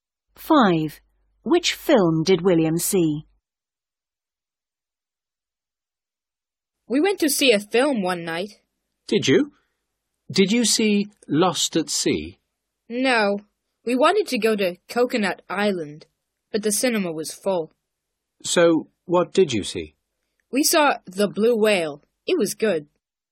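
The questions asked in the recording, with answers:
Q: Which film did William see?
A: The Blue Whale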